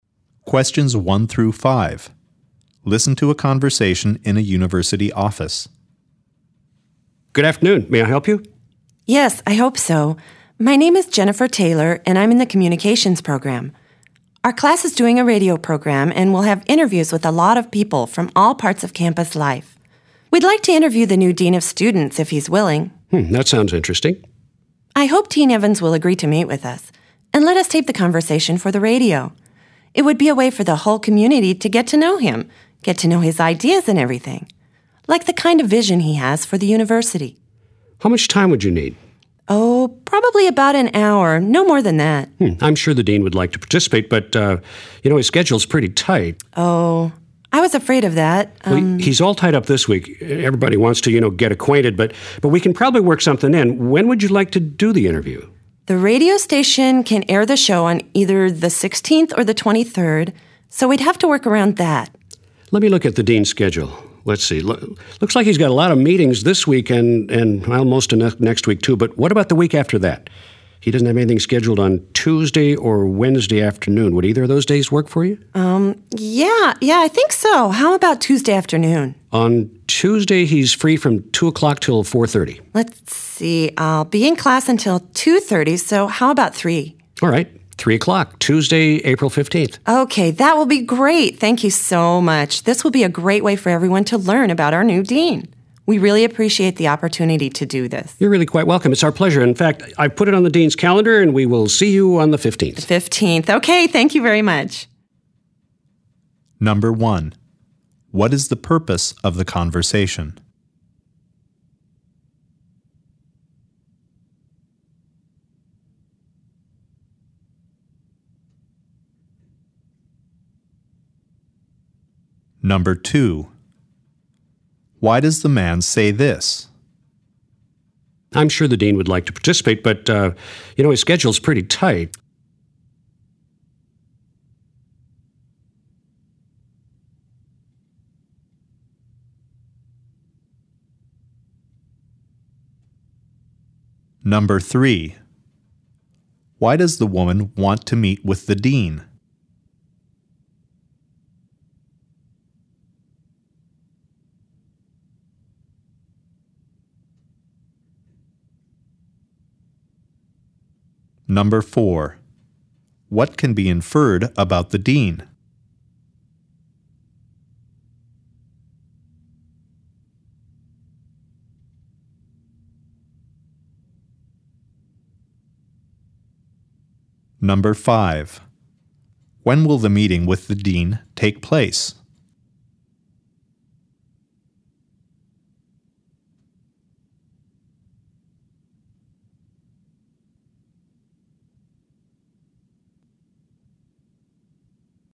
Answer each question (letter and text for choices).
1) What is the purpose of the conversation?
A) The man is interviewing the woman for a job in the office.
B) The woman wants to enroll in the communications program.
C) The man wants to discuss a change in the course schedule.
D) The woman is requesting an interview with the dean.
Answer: D) The woman is requesting an interview with the dean.

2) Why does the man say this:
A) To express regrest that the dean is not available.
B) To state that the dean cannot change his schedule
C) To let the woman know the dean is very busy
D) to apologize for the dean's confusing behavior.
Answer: C) To let the woman know the dean is very busy

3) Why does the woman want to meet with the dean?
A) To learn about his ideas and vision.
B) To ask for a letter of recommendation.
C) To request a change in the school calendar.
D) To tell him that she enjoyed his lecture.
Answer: A) To learn about his ideas and vision.

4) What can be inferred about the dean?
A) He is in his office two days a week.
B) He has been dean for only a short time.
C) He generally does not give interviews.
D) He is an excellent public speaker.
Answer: B) He has been dean for only a short time.

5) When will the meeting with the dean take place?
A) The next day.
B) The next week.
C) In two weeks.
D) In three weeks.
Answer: C) In two weeks.